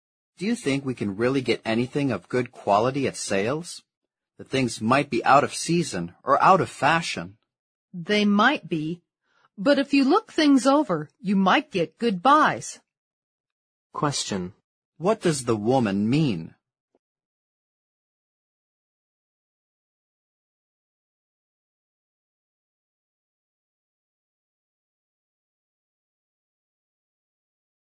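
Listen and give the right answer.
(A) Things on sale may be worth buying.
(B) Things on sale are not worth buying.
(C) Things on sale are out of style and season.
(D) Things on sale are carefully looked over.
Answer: (A) Things on sale may be worth buying.

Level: 六级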